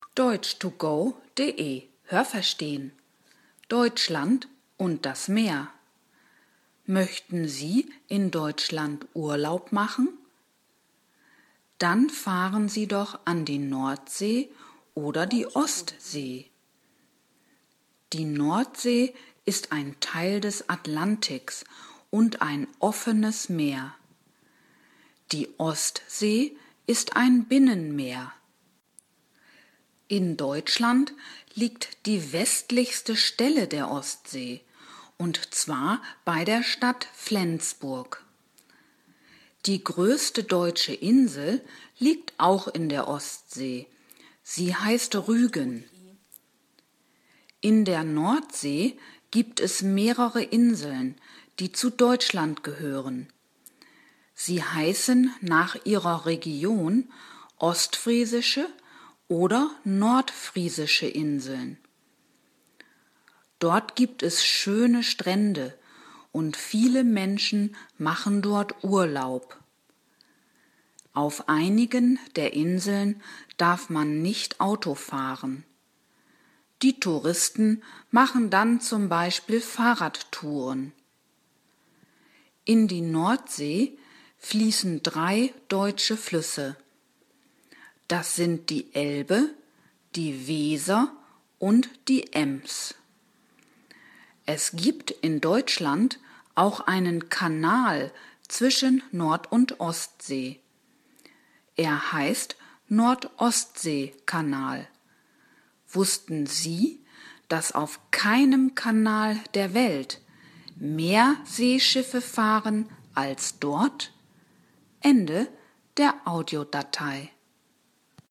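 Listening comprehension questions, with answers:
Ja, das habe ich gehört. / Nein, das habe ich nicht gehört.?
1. Deutschland hat zwei Meere.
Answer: Ja, das habe ich gehört.

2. Die Nordsee ist ein Teil des Pazifiks (= Pazifischer Ozean)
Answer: Nein, das habe ich nicht gehört.

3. Die westlichste Stelle der Ostsee liegt in Deutschland.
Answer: Ja, das habe ich gehört.

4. Die größte deutsche Insel liegt in der Ostsee.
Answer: Ja, das habe ich gehört.

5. In der Ostsee liegen auch die ostfriesischen und die nordfriesischen Inseln.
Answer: Nein, das habe ich nicht gehört.

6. Man darf auf keiner deutschen Insel Auto fahren.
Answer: Nein, das habe ich nicht gehört.

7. Zwischen Nord- und Ostsee gibt es einen Kanal.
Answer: Ja, das habe ich gehört.

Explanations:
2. Sie ist Teil des Atlantiks (= Atlantischer Ozean).
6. Nur auf einigen Inseln ist das Autofahren verboten.

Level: A2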